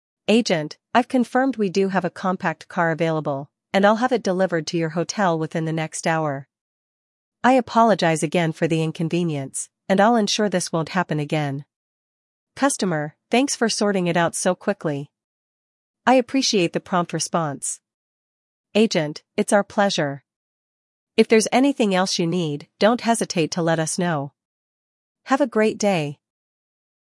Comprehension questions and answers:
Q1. What does the agent promise the customer?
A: Delivery of the car within an hour

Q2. How does the customer respond to the agent's solution?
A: They express appreciation for the prompt solution

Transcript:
Agent: "I've confirmed we do have a compact car available, and I'll have it delivered to your hotel within the next hour. I apologize again for the inconvenience, and I'll ensure this won't happen again."
Customer: "Thanks for sorting it out so quickly. I appreciate the prompt response."
Agent: "It's our pleasure. If there's anything else you need, don't hesitate to let us know. Have a great day!"